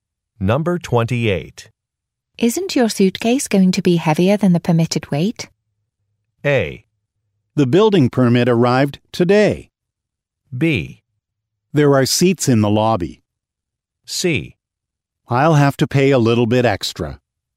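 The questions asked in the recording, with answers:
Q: Isn't your suitcase going to be heavier than the permitted weight?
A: C: I'll have to pay a little bit extra.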